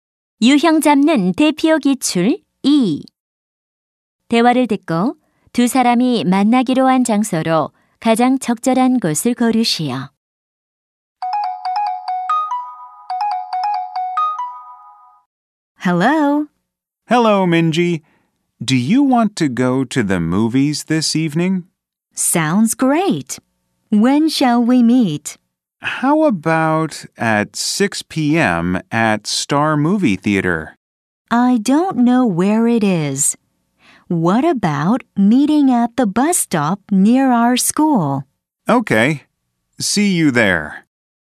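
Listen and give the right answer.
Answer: 학교 근처 버스 정류장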